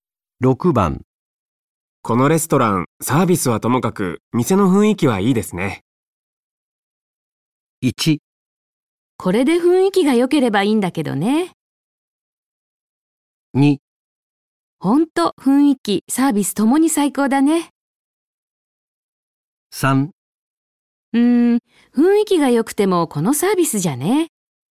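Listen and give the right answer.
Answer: 3: 雰囲気が良くてもこのサービスじゃね。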